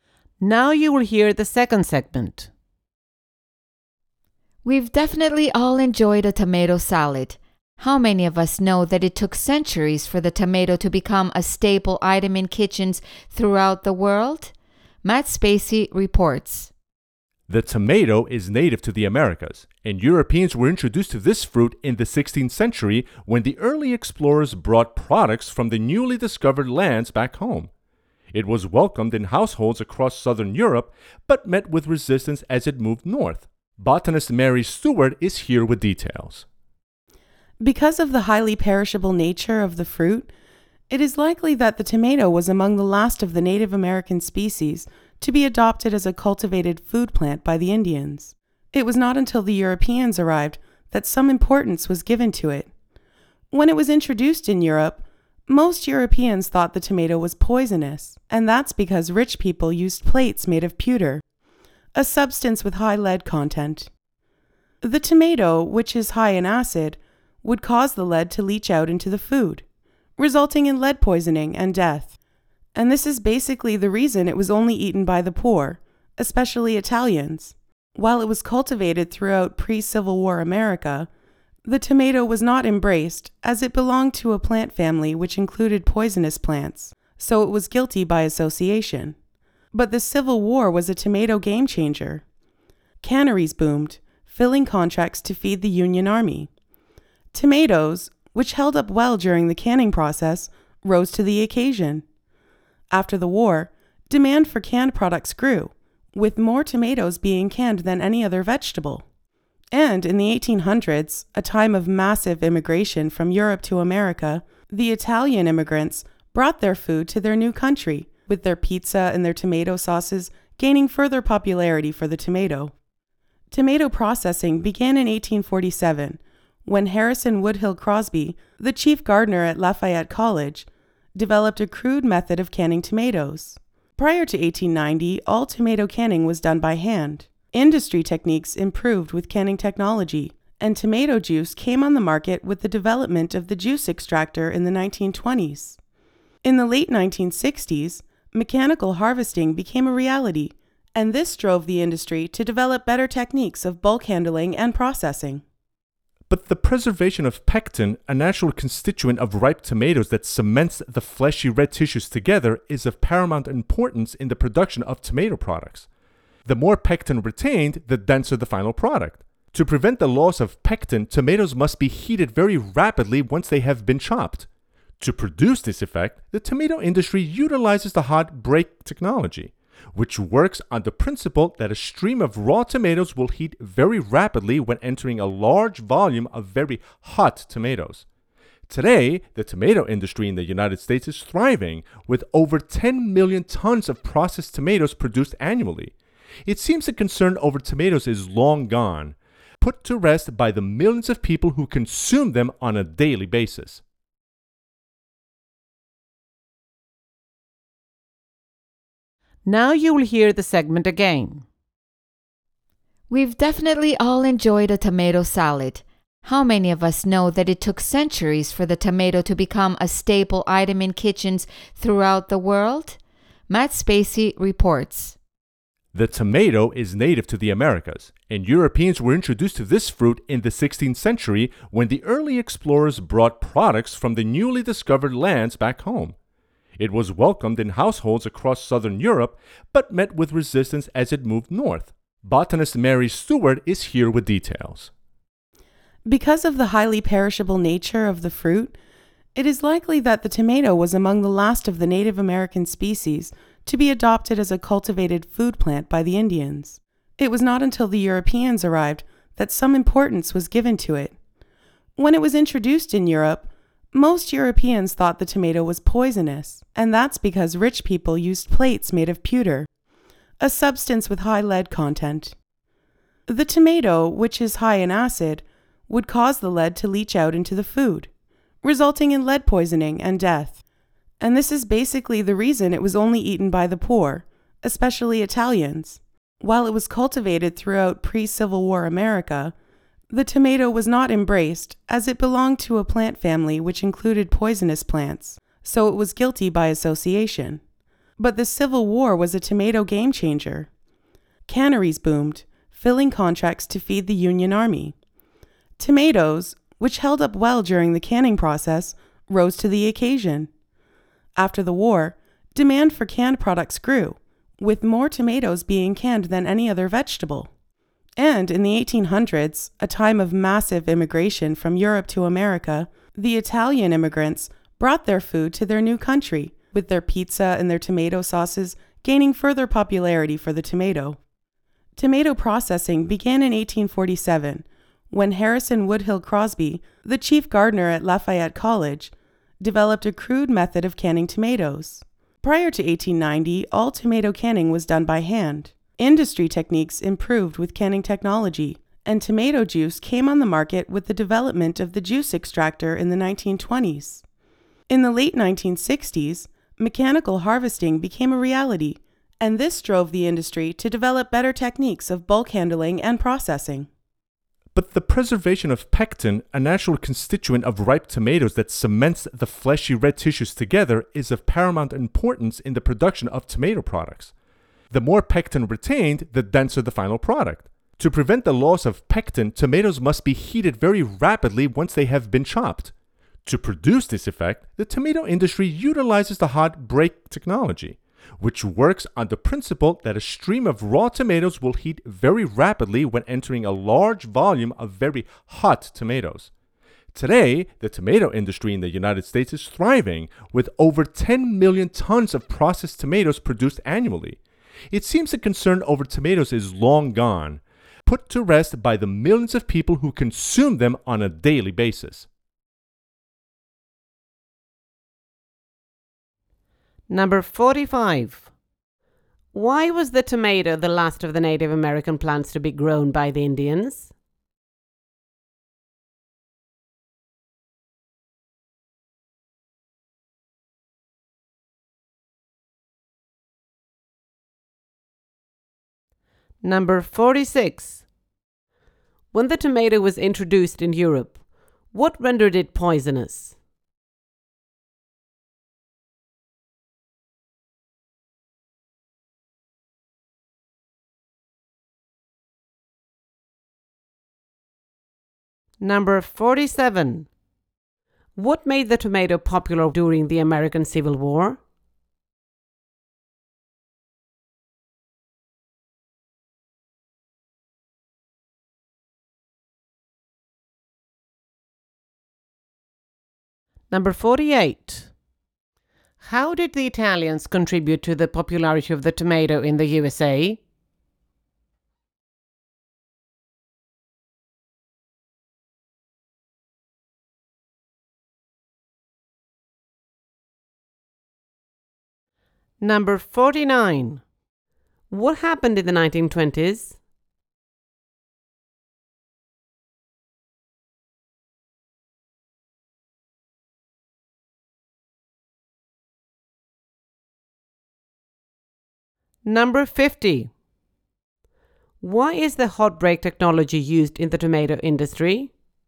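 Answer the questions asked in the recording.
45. Because the fruit is highly perishable
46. Lead leaching from pewter plates because of the tomato's acid
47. It held up well during canning for feeding the Union Army
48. Italian immigrants brought their pizza and tomato sauces
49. Tomato juice came on the market with the development of the juice extractor
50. To heat chopped tomatoes rapidly to prevent the loss of pectin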